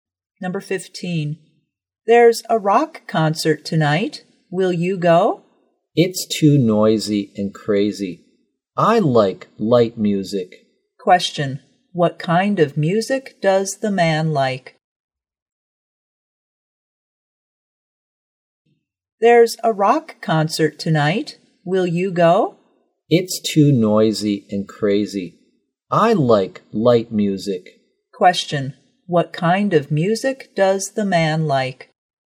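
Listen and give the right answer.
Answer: Light music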